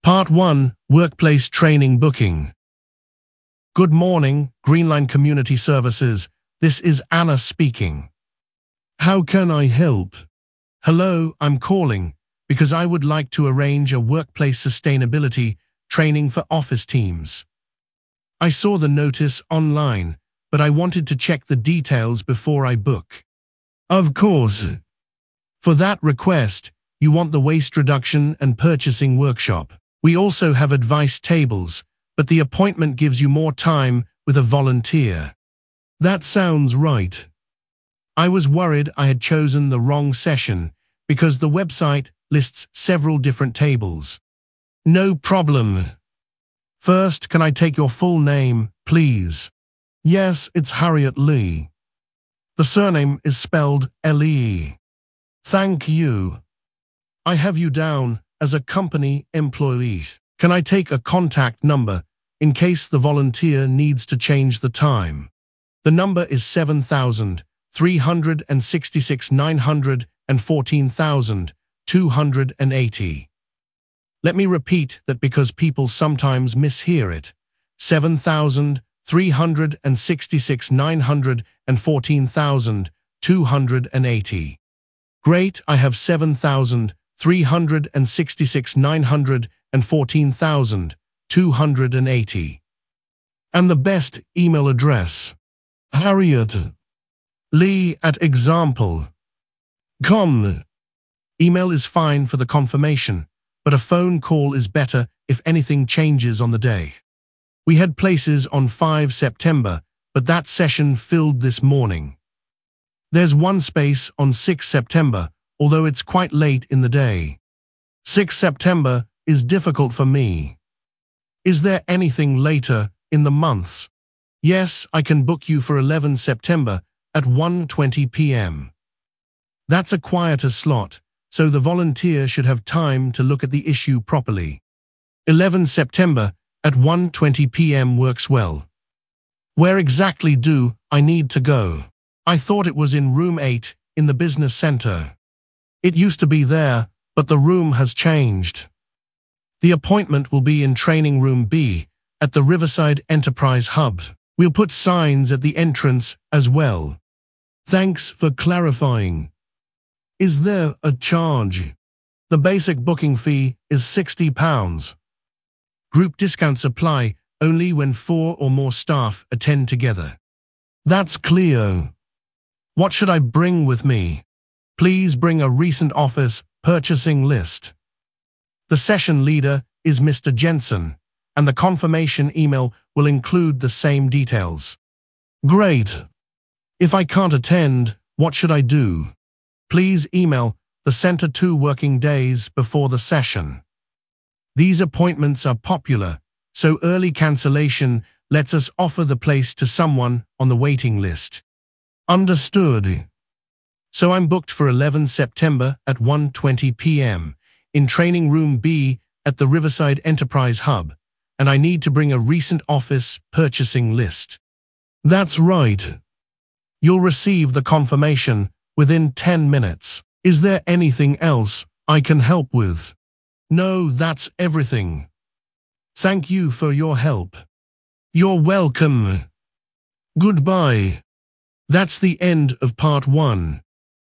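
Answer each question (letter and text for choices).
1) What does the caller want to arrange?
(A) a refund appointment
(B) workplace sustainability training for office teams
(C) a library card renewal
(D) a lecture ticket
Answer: (B) workplace sustainability training for office teams

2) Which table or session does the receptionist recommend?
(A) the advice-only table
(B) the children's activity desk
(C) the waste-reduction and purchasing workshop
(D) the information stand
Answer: (C) the waste-reduction and purchasing workshop

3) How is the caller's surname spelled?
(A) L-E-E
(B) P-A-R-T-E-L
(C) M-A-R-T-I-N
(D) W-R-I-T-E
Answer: (A) L-E-E

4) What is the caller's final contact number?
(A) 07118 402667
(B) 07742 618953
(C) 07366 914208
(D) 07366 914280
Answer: (D) 07366 914280

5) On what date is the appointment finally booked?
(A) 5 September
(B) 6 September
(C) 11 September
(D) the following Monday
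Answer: (C) 11 September

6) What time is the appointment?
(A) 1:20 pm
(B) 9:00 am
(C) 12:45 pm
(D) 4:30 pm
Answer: (A) 1:20 pm

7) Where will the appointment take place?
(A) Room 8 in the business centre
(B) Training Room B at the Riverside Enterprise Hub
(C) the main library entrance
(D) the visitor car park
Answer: (B) Training Room B at the Riverside Enterprise Hub

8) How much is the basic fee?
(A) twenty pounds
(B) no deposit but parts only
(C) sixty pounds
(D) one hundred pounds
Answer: (C) sixty pounds

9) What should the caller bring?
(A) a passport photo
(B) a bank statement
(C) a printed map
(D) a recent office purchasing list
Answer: (D) a recent office purchasing list

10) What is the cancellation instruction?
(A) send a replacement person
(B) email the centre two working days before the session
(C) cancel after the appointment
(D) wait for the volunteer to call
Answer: (B) email the centre two working days before the session

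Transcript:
Part 1: Workplace Training Booking
Receptionist: Good morning, Greenline Community Services, this is Anna speaking. How can I help?
Caller: Hello, I am calling because I would like to arrange a workplace sustainability training for office teams. I saw the notice online, but I wanted to check the details before I book.
Receptionist: Of course. For that request, you want the waste-reduction and purchasing workshop. We also have advice tables, but the appointment gives you more time with a volunteer.
Caller: That sounds right. I was worried I had chosen the wrong session because the website lists several different tables.
Receptionist: No problem. First, can I take your full name, please?
Caller: Yes, it is Harriet Lee. The surname is spelled L-E-E.
Receptionist: Thank you. I have you down as a company employee. Can I take a contact number in case the volunteer needs to change the time?
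Caller: The number is 07366 914280. Let me repeat that because people sometimes mishear it: 07366 914280.
Receptionist: Great, I have 07366 914280. And the best email address?
Caller: harriet.lee@example.com. Email is fine for the confirmation, but a phone call is better if anything changes on the day.
Receptionist: We had places on 5 September, but that session filled this morning. There is one space on 6 September, although it is quite late in the day.
Caller: 6 September is difficult for me. Is there anything later in the month?
Receptionist: Yes, I can book you for 11 September at 1:20 pm. That is a quieter slot, so the volunteer should have time to look at the issue properly.
Where exactly do I need to go? I thought it was in Room 8 in the business centre.
Receptionist: It used to be there, but the room has changed. The appointment will be in Training Room B at the Riverside Enterprise Hub. 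We will put signs at the entrance as well.
Caller: Thanks for clarifying. Is there a charge?
Receptionist: The basic booking fee is sixty pounds. Group discounts apply only when four or more staff attend together.
Caller: That is clear. What should I bring with me?
Receptionist: Please bring a recent office purchasing list. The session leader is Mr. Jensen, and the confirmation email will include the same details.
Caller: Great. If I cannot attend, what should I do?
Receptionist: Please email the centre two working days before the session. These appointments are popular, so early cancellation lets us offer the place to someone on the waiting list.
Caller: Understood.
Is there anything else I can help with?
Caller: No, that is everything. Thank you for your help.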